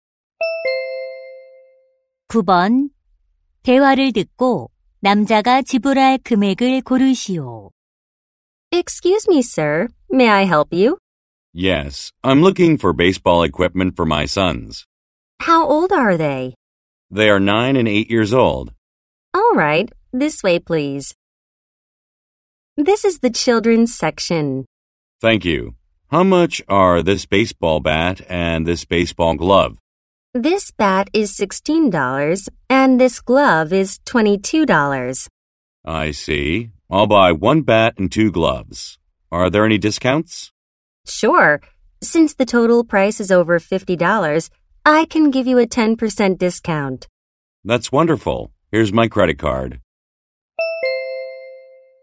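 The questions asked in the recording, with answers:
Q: 대화를 듣고 남자가 지불할 금액을 고르시오.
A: 54달러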